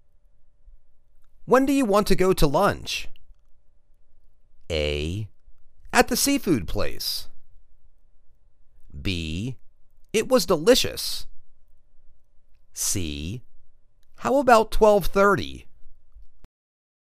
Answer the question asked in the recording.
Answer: How about 12:30?